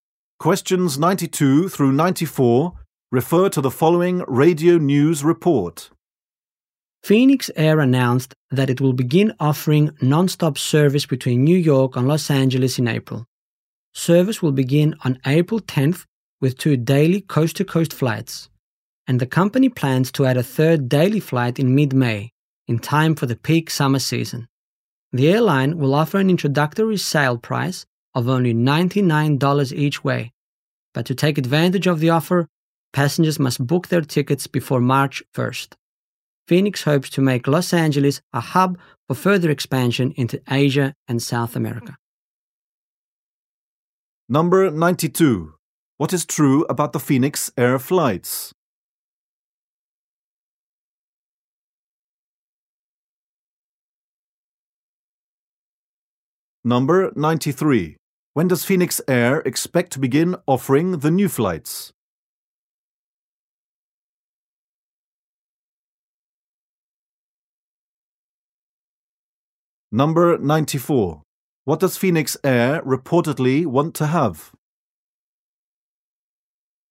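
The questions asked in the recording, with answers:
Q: When does Phoenix Air expect to begin offering the new flights?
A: April 10th

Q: What does Phoenix Air reportedly want to have?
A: A hub in Los Angeles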